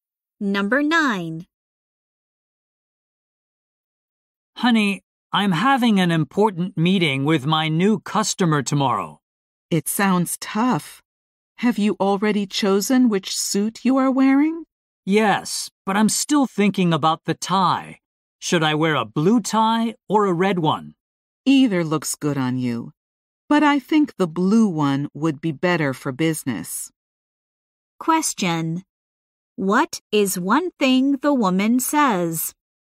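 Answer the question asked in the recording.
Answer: The blue tie would be better for business.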